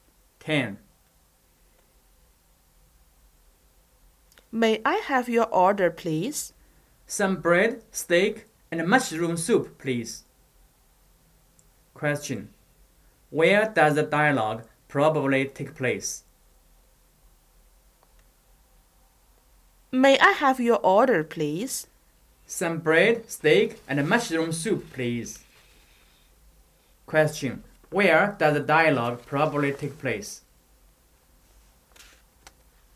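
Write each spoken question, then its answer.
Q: Where does the dialogue probably take place?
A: In a restaurant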